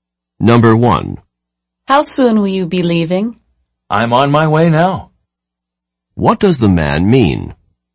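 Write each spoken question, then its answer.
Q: What does the man mean?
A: He is leaving right now.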